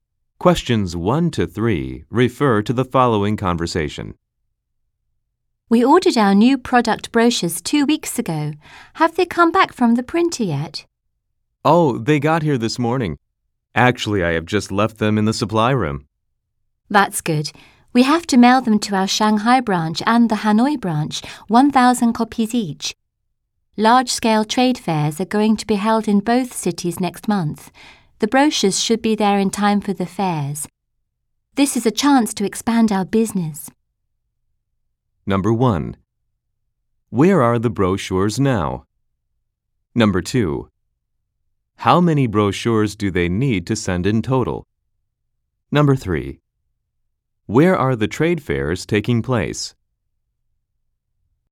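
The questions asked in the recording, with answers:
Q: Where are the brochures now?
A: In the supply room

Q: How many brochures do they need to send in total?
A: 2,000

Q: Where are the trade fairs taking place?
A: In Shanghai and Hanoi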